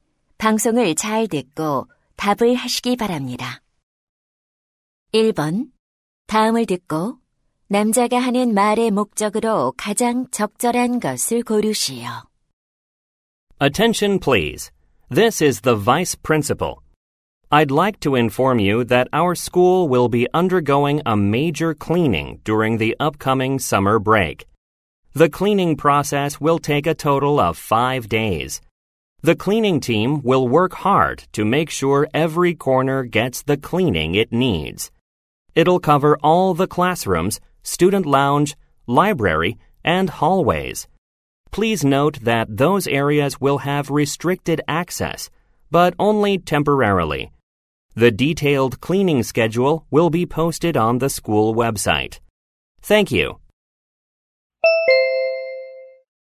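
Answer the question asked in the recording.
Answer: 여름 방학 동안의 학교 대청소 일정을 안내하려고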